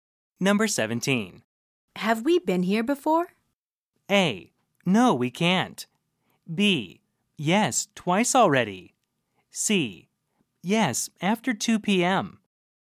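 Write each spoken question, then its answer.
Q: Have we been here before?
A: B: Yes, twice already.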